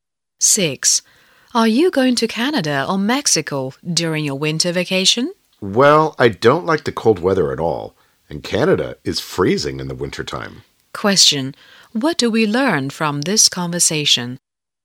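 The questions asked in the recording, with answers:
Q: Question. What do we learn from this conversation?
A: The woman will go to Mexico, not Canada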